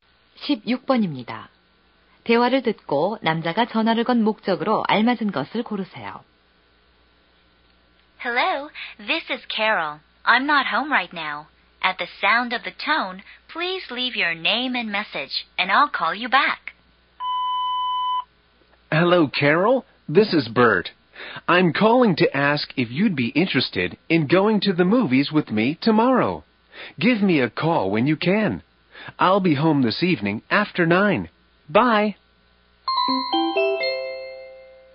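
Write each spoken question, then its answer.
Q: 대화를 듣고 남자가 전화를 건 목적으로 알맞은 것을 고르세요.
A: 영화 보러 가자고 제안하려고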